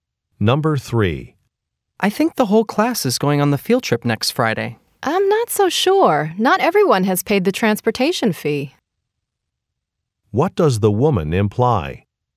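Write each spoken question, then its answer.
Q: What does the woman imply?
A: Not everyone may go on the trip, since some haven't paid the transportation fee.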